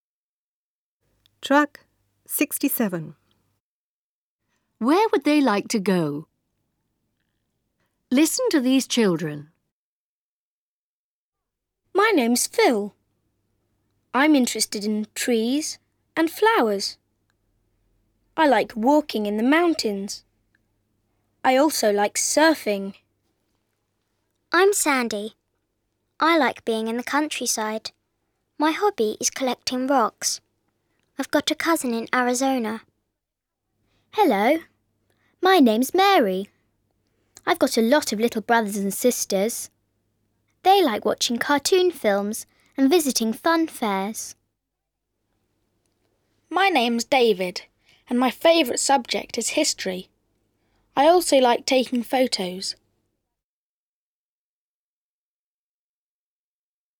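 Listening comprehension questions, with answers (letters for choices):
Listen, match the names and the interests.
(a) Phil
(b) Sandy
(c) David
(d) Mary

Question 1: He/she is interested in history.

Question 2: His/her hobby is walking in the mountains and surfing.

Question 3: His/her little brothers and sisters like watching cartoons.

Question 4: He/she is interested in collecting rocks.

Listen again and answer the questions.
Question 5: What's Phil interested in?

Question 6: What's Sandy's hobby?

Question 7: Who has got a lot of little brothers and sisters?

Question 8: What do they like doing?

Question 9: What's David's favourite subject?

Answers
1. c
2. a
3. d
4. b
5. Trees and flowers
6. Collecting rocks
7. Mary
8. Watching cartoon films and visiting fun fairs
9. History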